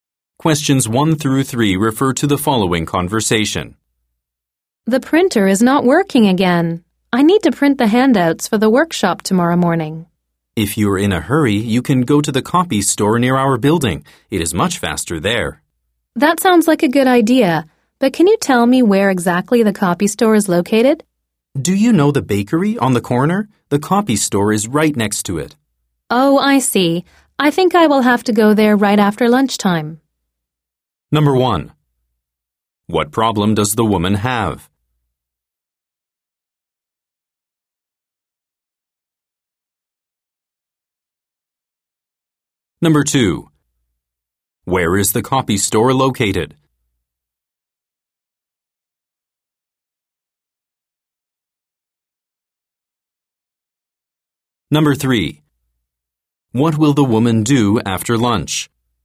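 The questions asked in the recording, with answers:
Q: What problem does the woman have?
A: The printer is not working.

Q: Where is the copy store located?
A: Right next to the bakery on the corner.

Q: What will the woman do after lunch?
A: Go to the copy store.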